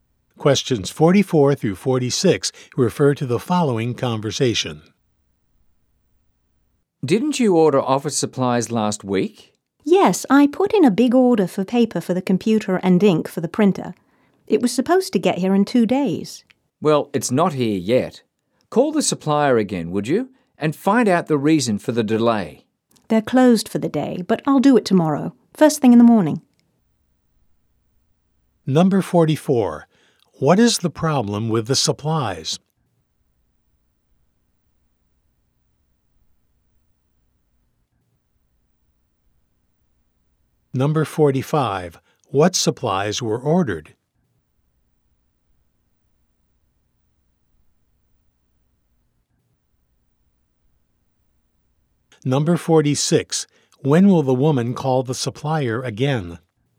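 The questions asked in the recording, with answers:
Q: What is the problem with the supplies?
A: They have not arrived yet

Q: What supplies were ordered?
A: Computer paper and printer ink

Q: When will the woman call the supplier again?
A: Tomorrow morning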